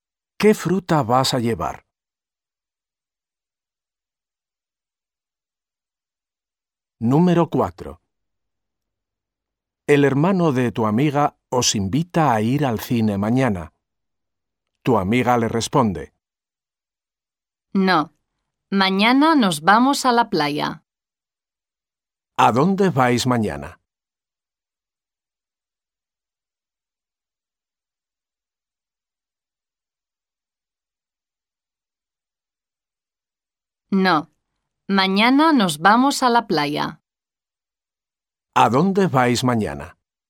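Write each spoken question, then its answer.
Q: ¿A dónde vais mañana?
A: A la playa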